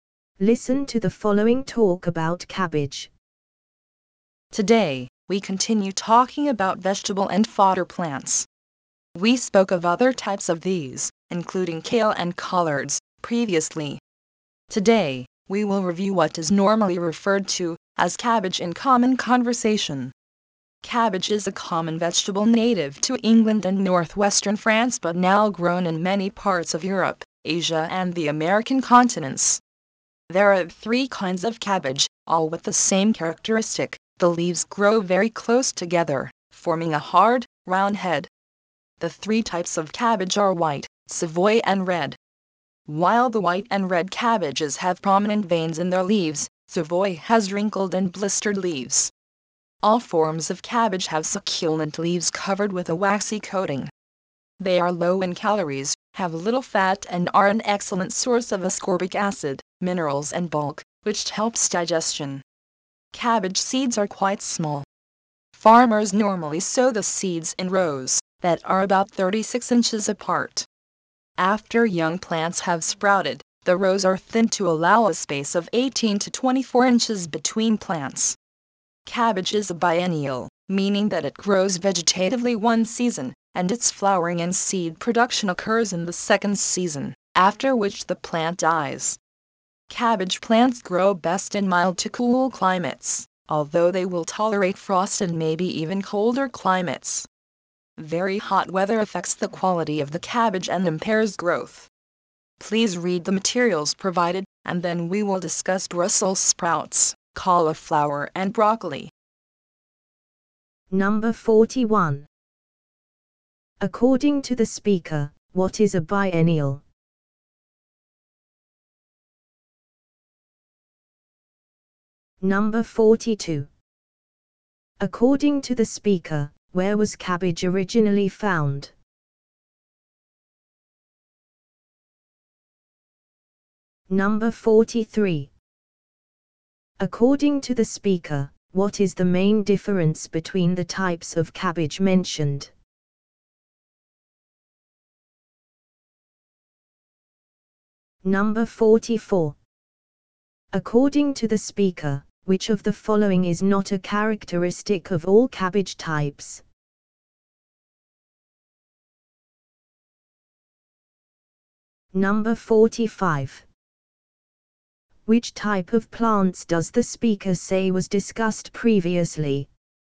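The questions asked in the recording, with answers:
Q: According to the speaker, what is a biennial?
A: A plant that grows vegetatively one season, flowers and seeds the second, then dies

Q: According to the speaker, where was cabbage originally found?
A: England and northwestern France

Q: Which type of plants does the speaker say was discussed previously?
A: Kale and collards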